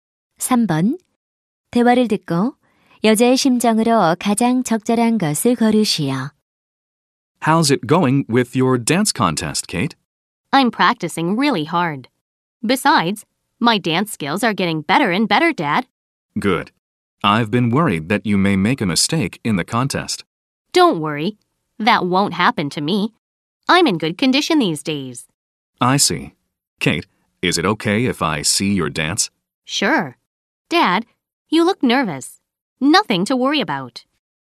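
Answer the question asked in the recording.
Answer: 자신감 있음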